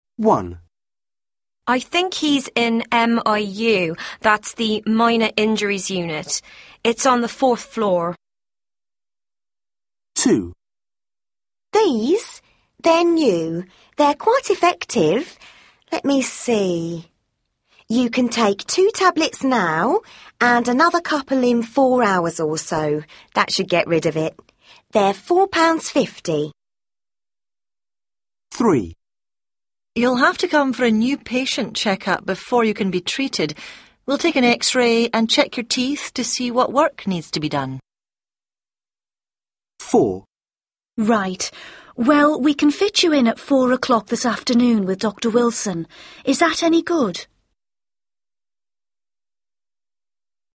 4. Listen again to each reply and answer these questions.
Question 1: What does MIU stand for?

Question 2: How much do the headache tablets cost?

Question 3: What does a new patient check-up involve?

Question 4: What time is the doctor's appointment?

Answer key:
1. Minor Injuries Unit
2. £4.50
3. an X-ray and check-up
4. 4 pm

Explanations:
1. I think he's in MIU, that's the Minor Injuries Unit. It's on the fourth floor.
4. Right, well we can fit you in at four o'clock this afternoon with Dr Wilson. Is that any good?